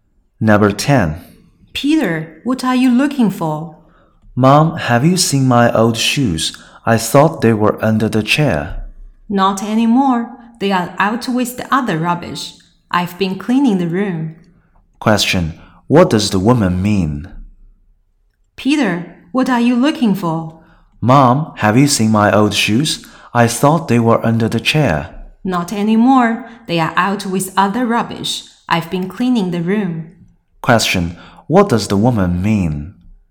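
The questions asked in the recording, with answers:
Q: What does the woman mean?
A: She has thrown Peter's old shoes away with the rubbish.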